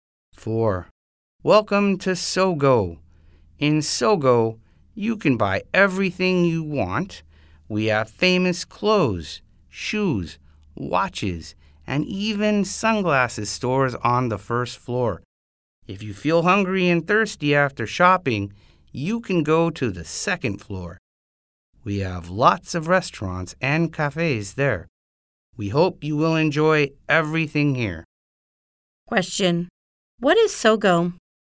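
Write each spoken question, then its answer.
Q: Question, what is Sogo?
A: A department store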